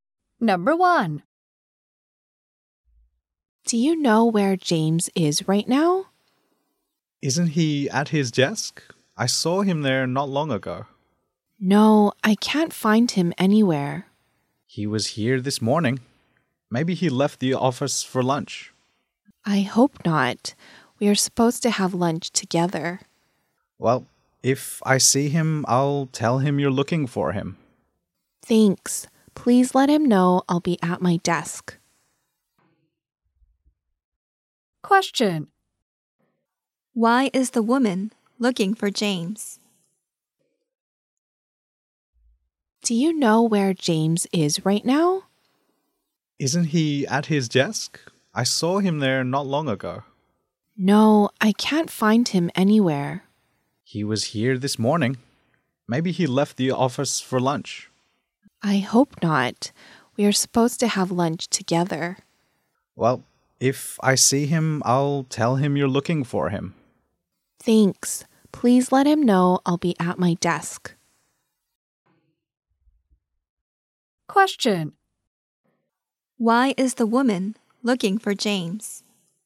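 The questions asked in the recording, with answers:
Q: Why is the woman looking for James?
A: They are supposed to have lunch together.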